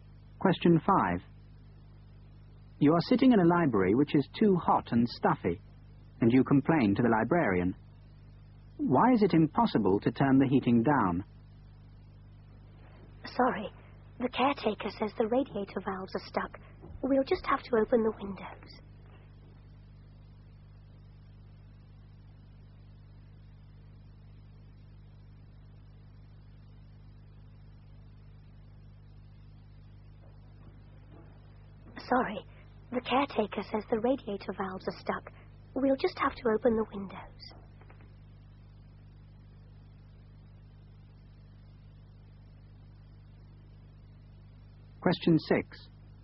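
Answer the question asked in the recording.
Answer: The radiator valves are stuck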